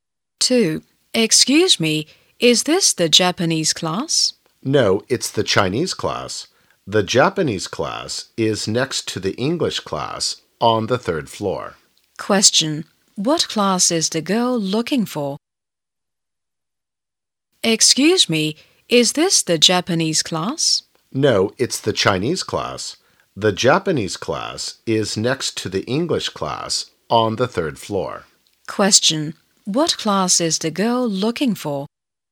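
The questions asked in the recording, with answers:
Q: Question, what class is the girl looking for?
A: The Japanese class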